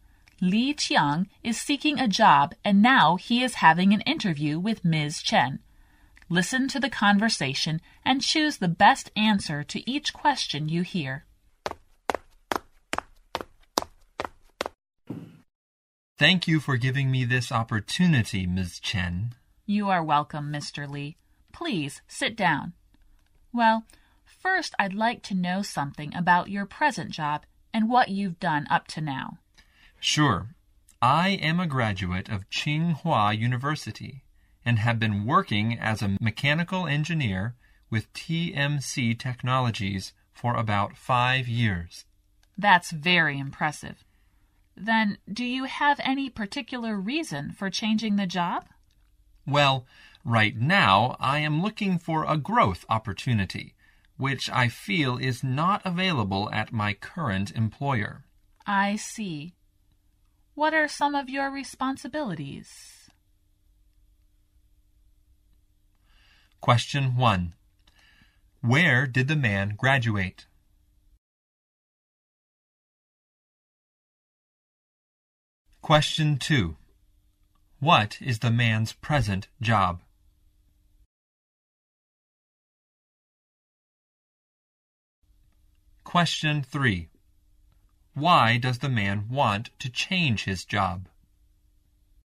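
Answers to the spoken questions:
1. Tsinghua University
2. Mechanical engineer
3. He is looking for a growth opportunity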